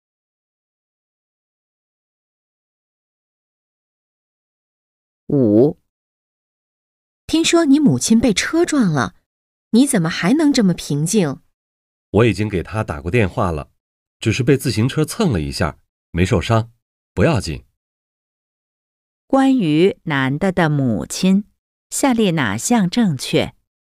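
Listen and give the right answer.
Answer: 只是被自行车蹭了一下,没受伤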